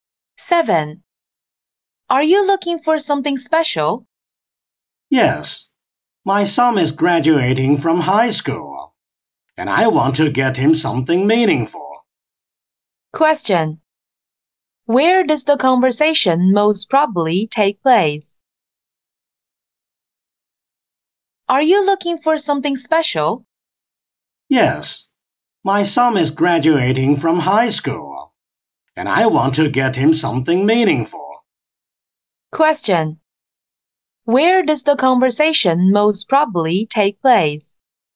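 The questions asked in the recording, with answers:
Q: Where does the conversation most probably take place?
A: In a shop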